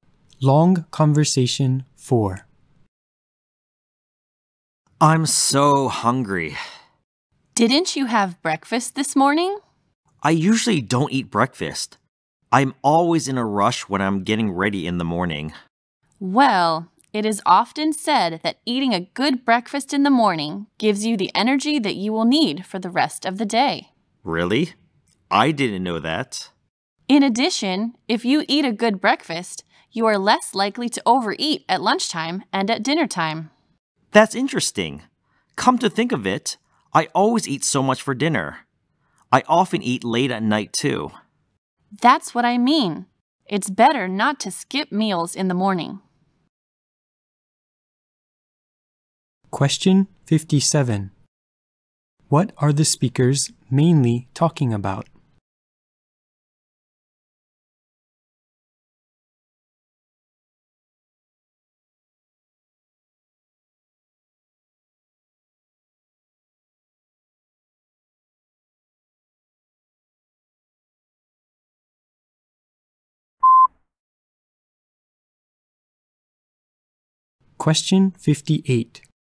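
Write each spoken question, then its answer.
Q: What are the speakers mainly talking about?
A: The importance of eating breakfast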